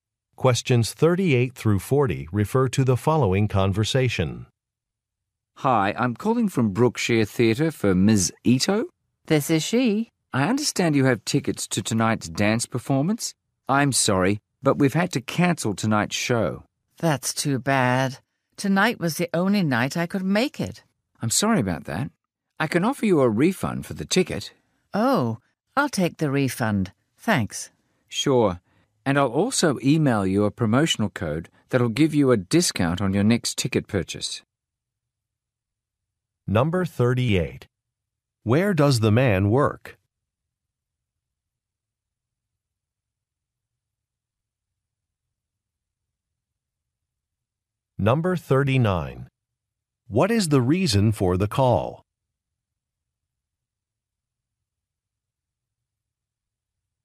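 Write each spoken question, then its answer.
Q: Where does the man work?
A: At a theater

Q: What is the reason for the call?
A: A performance was canceled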